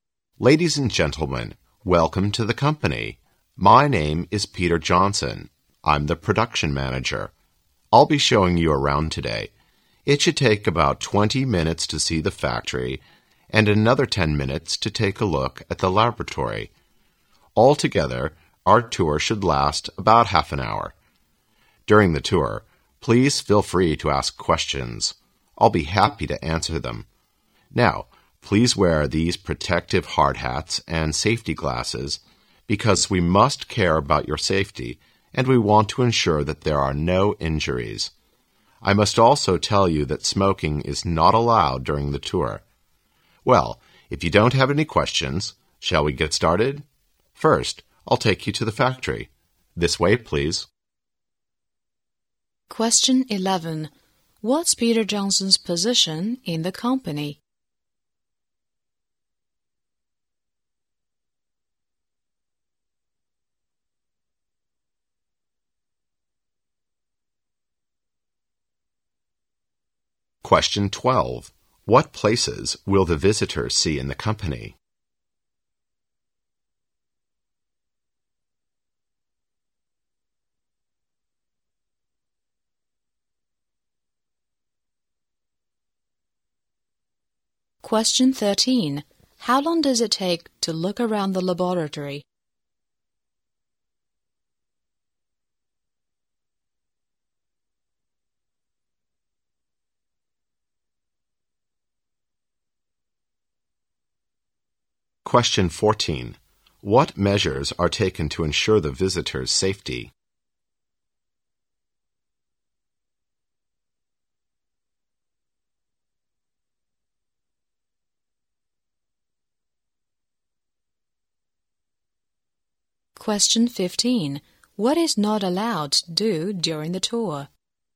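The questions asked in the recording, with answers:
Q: What's Peter Johnson's position in the company?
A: Production manager

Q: What places will the visitors see in the company?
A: The factory and the laboratory

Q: How long does it take to look around the laboratory?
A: 10 minutes

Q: What measures are taken to ensure the visitors' safety?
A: Wearing hard hats and safety glasses

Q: What is not allowed to do during the tour?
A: Smoking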